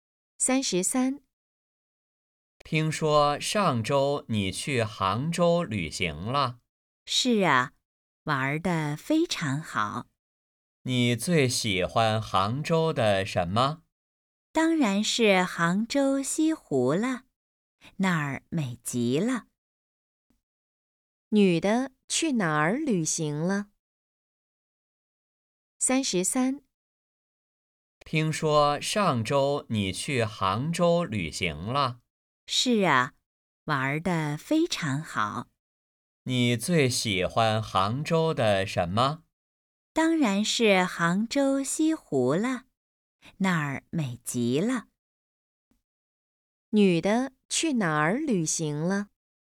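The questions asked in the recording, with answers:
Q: 女的去哪儿旅行了?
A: 杭州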